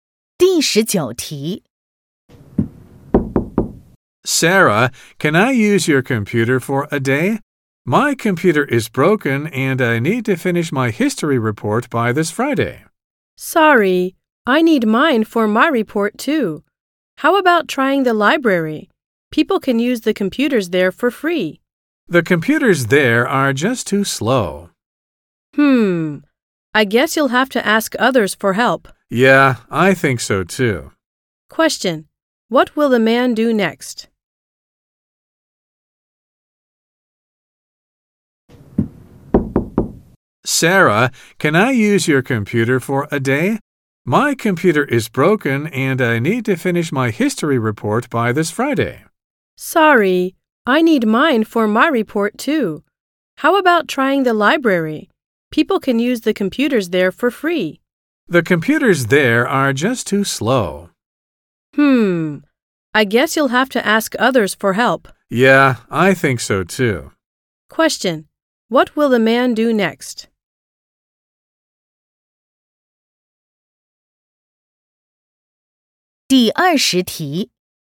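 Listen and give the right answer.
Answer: Ask others for help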